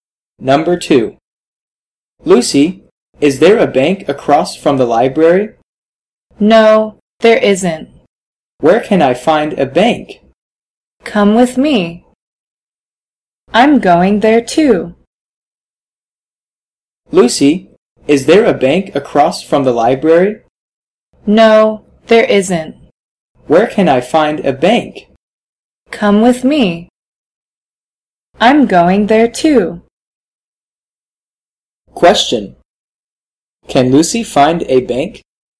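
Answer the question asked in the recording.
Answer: Yes, she can.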